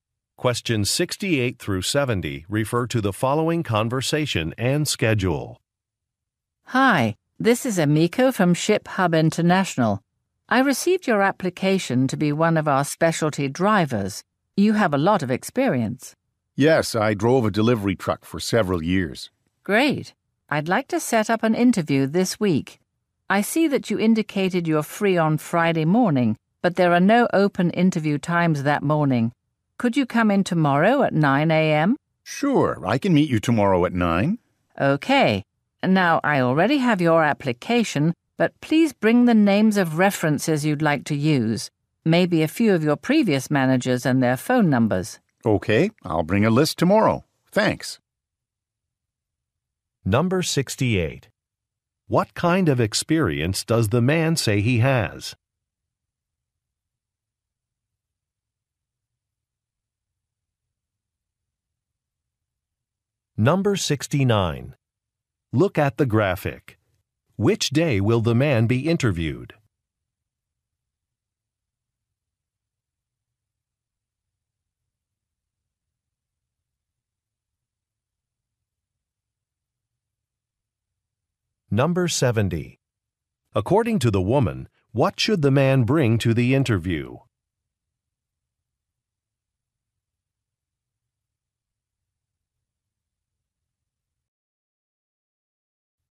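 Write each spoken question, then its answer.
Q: What kind of experience does the man say he has?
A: Driving a delivery truck

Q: According to the woman, what should the man bring to the interview?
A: A list of references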